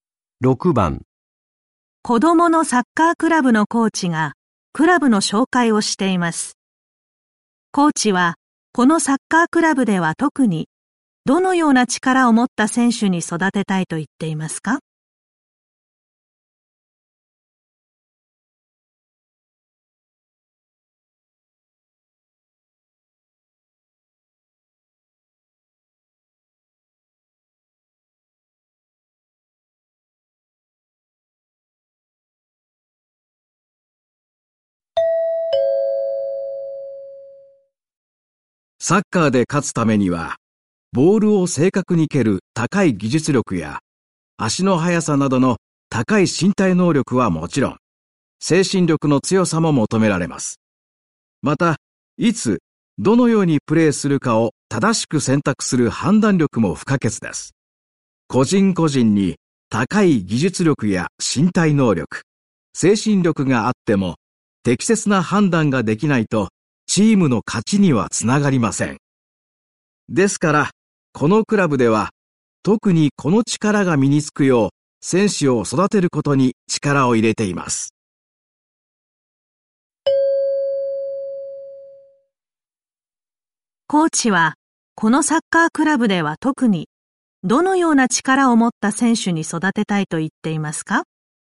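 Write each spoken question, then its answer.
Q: コーチは、このサッカークラブでは特に、どのような力を持った選手に育てたいと言っていますか?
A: 判断力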